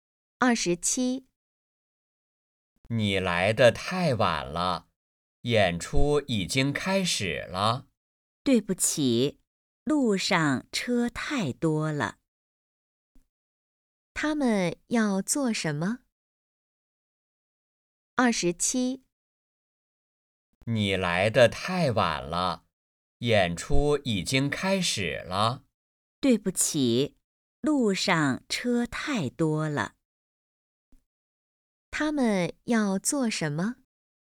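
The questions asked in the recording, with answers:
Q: 他们要做什么?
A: 看演出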